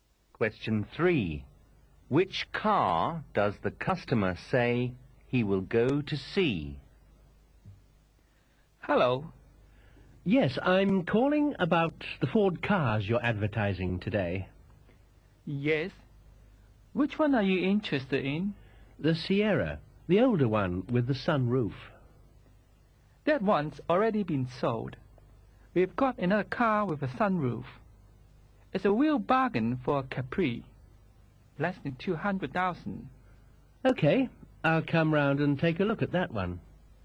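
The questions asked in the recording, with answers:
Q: Which car does the customer say he will go to see?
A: The Ford Capri with the sunroof, costing less than 200,000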